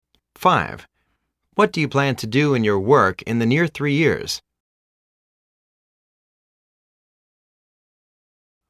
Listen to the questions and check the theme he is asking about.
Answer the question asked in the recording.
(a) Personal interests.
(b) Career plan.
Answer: (b) Career plan.

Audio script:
4.Do you read in your free time?
5.What do you plan to do in your work in the near 3 years?